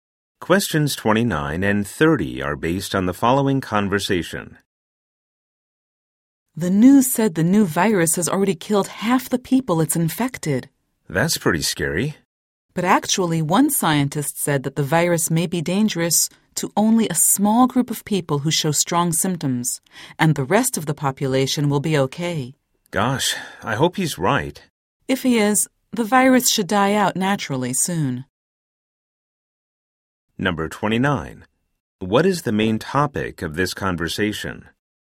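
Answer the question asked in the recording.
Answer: A new virus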